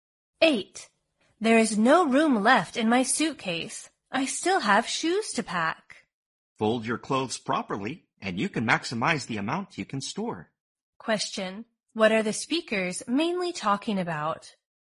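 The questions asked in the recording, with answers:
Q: What are the speakers mainly talking about?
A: How to pack a suitcase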